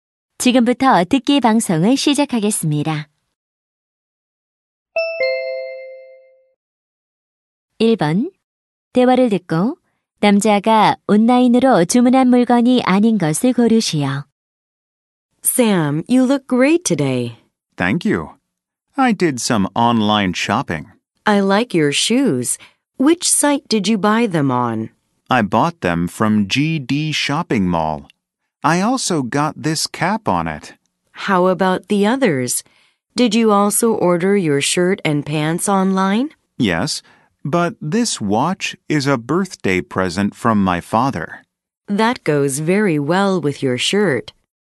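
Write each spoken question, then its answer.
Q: 대화를 듣고 남자가 온라인으로 주문한 물건이 아닌 것을 고르시오.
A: 손목시계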